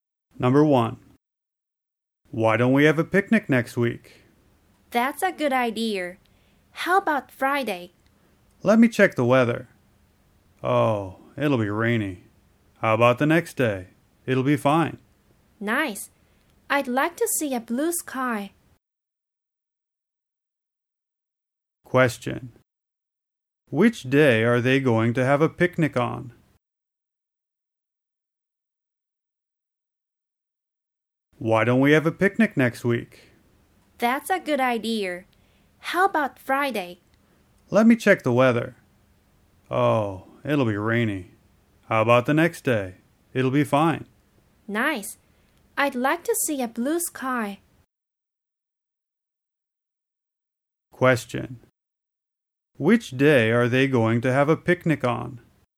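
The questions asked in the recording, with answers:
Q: Which day are they going to have a picnic on?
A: Saturday (the day after Friday)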